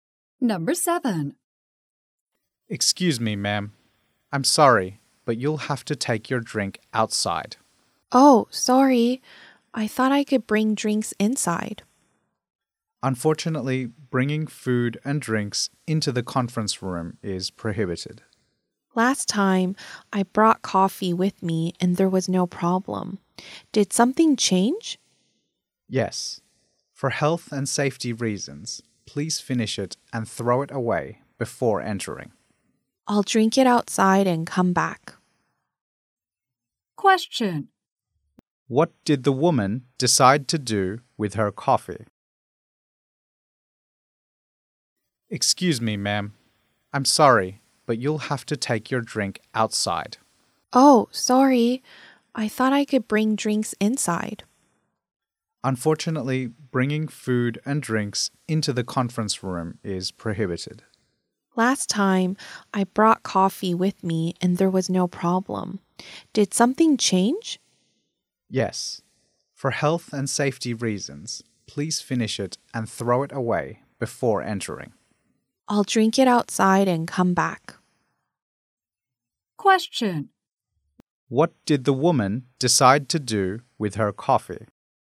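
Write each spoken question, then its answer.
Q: What did the woman decide to do with her coffee?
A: Drink it outside before coming back in.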